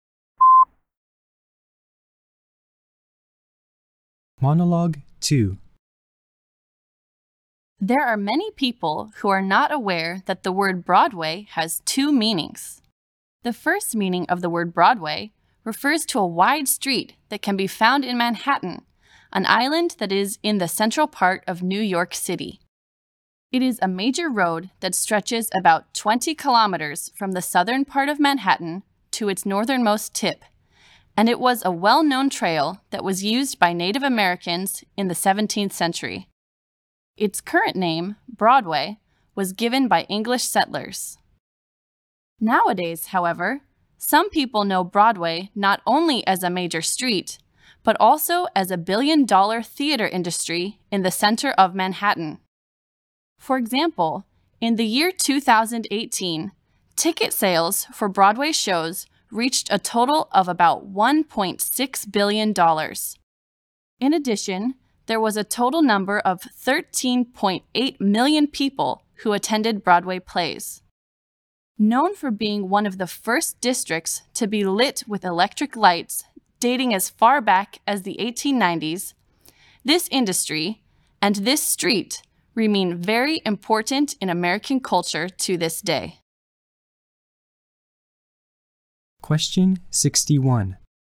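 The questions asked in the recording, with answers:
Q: According to the monologue, which is one definition of the word Broadway?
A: A wide street in Manhattan (or the theater industry)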